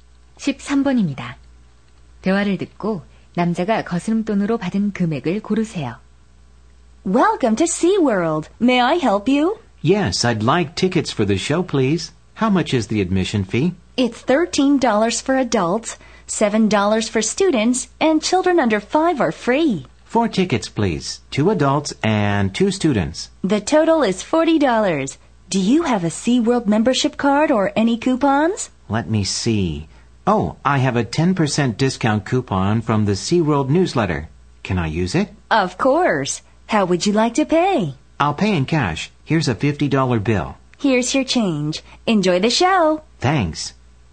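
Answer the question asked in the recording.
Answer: 14달러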